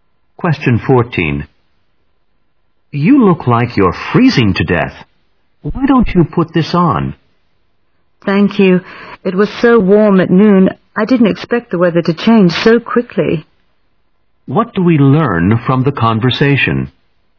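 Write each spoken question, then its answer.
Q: What do we learn from the conversation?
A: The woman is very cold because the weather changed unexpectedly.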